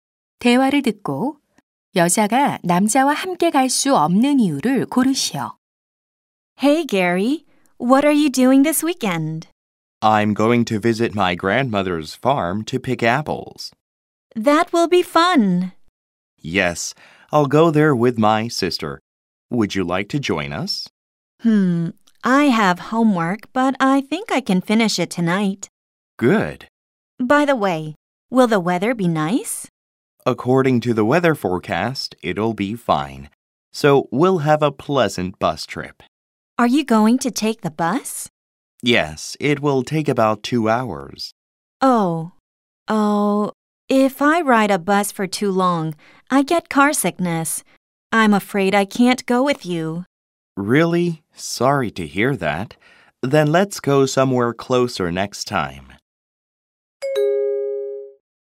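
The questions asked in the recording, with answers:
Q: 대화를 듣고 여자가 남자와 함께 갈 수 없는 이유를 고르시오.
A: 버스를 오래 타면 멀미를 해서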